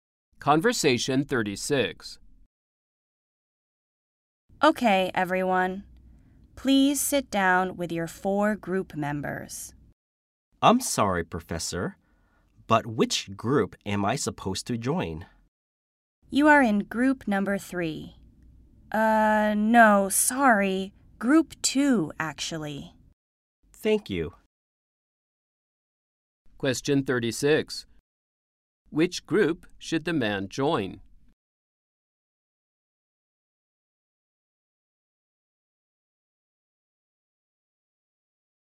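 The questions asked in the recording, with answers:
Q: Which group should the man join?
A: Group 2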